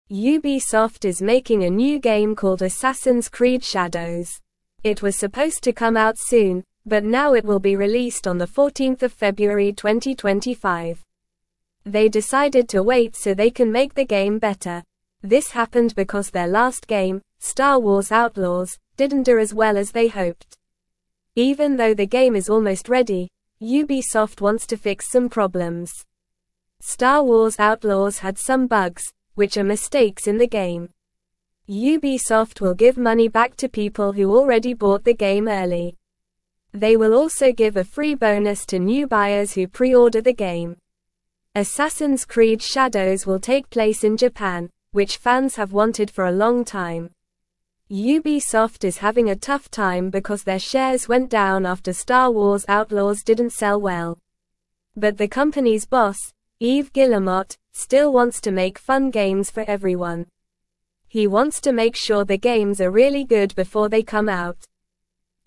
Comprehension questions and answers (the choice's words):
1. Ubisoft is (1)______ a new game called Assassin's Creed Shadows.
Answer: making

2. It was (2)______ to come out soon, but now it will be released on 14 February 2025.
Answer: supposed

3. They (3)______ to wait so they can make the game better.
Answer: decided

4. This happened because their last game, (4)______ Wars Outlaws, didn't do as well as they hoped.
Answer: Star

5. Even though the game is almost ready, Ubisoft wants to fix some (5)______.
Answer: problems

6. Ubisoft will (6)______ money back to people who already (7)______ the game early.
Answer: give

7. Ubisoft will (6)______ money back to people who already (7)______ the game early.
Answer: bought

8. Assassin's Creed Shadows will (8)______ place in Japan, which fans have wanted for a long time.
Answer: take

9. (9)______ is having a tough time because their shares went down after Star Wars (10)______ didn't sell well.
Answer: Ubisoft

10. (9)______ is having a tough time because their shares went down after Star Wars (10)______ didn't sell well.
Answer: Outlaws

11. But the company's (11)______, Yves Guillemot, still wants to make fun games for everyone.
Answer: boss

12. He wants to make (12)______ the games are really good before they come out.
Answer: sure

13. Why is Ubisoft delaying the release of Assassin's Creed Shadows?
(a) Because they ran out of money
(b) To cancel the game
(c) To release it on a holiday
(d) To make the game better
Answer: To make the game better

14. What was the name of Ubisoft's last game that didn't do well?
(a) Assassin's Creed Shadows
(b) Fortnite Legends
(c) Minecraft Adventures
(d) Star Wars Outlaws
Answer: Star Wars Outlaws

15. What are bugs in a video game?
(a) Special features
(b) Mistakes in the game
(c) Achievements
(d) Characters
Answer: Mistakes in the game

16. What will Ubisoft do for people who already bought Star Wars Outlaws early?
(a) Give them a free game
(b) Give money back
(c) Do nothing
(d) Make them wait longer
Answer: Give money back

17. Why did Ubisoft's shares go down?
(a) Star Wars Outlaws didn't sell well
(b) The boss quit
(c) They released too many games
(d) They made too much money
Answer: Star Wars Outlaws didn't sell well

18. Who is the boss of Ubisoft?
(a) Yves Guillemot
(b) Mark Zuckerberg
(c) Elon Musk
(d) Jeff Bezos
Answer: Yves Guillemot

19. What does Yves Guillemot want to make sure of before releasing games?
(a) They are expensive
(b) They have a lot of bugs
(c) They are really good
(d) They are released early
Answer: They are really good

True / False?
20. New buyers who pre-order Assassin's Creed Shadows will not receive a free bonus.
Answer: False

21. The release date for Assassin's Creed Shadows has been moved to February 14, 2025.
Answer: True

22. The delay in the game's release is not because Ubisoft wants to make the game better.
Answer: False

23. Ubisoft is creating a new game called Assassin's Creed Shadows.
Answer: True

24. Players who bought Star Wars Outlaws early will get their money back.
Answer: True

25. Ubisoft is not working on fixing bugs in the new game to make it better.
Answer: False

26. Star Wars Outlaws, Ubisoft's previous game, did better than expected.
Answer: False

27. Assassin's Creed Shadows will be set in Japan, a location fans have been wanting for a long time.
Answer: True

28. What is the name of the new game that Ubisoft is making?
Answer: Assassin's Creed Shadows.

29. Why did Ubisoft decide to delay the release of Assassin's Creed Shadows?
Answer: They wanted to make the game better because their last game didn't do well.

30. What are bugs in a game?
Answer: Bugs are mistakes in the game that can make it not work correctly.

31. What will Ubisoft do for people who already bought the game early?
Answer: They will give money back to people who already bought the game early.

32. Why is Ubisoft having a tough time?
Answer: Their shares went down after their last game didn't sell well.

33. What does Yves Guillemot want to make sure of before releasing the games?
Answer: He wants to make sure the games are really good before they come out.

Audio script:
Ubisoft is making a new game called Assassin's Creed Shadows. It was supposed to come out soon, but now it will be released on 14 February 2025. They decided to wait so they can make the game better. This happened because their last game, Star Wars Outlaws, didn't do as well as they hoped.
Even though the game is almost ready, Ubisoft wants to fix some problems. Star Wars Outlaws had some bugs, which are mistakes in the game. Ubisoft will give money back to people who already bought the game early. They will also give a free bonus to new buyers who pre-order the game.
Assassin's Creed Shadows will take place in Japan, which fans have wanted for a long time. Ubisoft is having a tough time because their shares went down after Star Wars Outlaws didn't sell well. But the company's boss, Yves Guillemot, still wants to make fun games for everyone. He wants to make sure the games are really good before they come out.

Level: Level 2